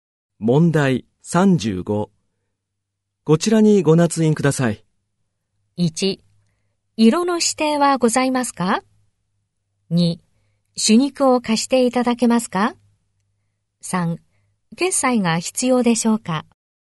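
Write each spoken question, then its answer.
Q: こちらにご捺印ください。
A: 2: 朱肉を貸していただけますか?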